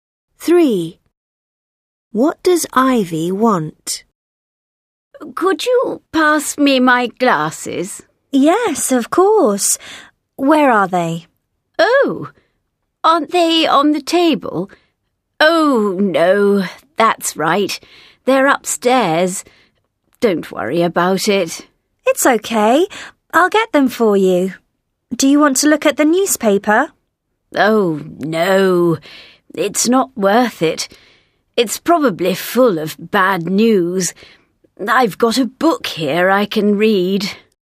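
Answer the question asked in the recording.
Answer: her glasses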